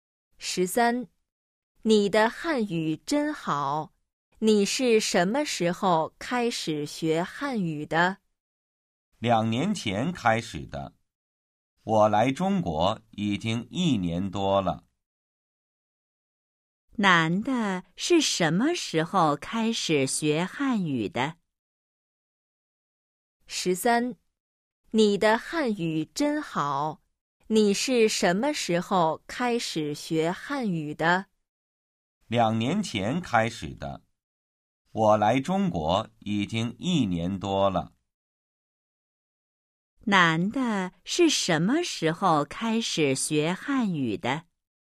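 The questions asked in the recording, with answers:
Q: 男的是什么时候开始学汉语的?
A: 两年前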